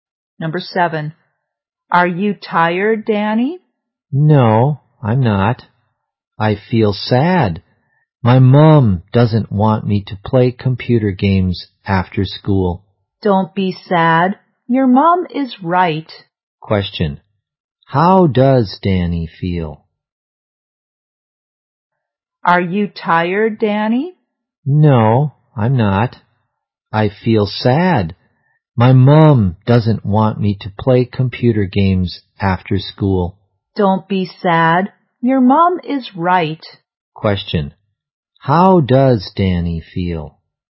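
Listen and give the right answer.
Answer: Sad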